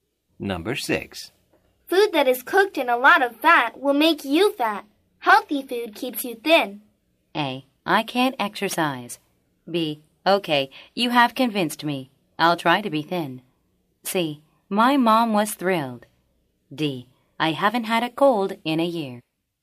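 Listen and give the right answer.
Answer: B: Okay, you have convinced me. I'll try to be thin.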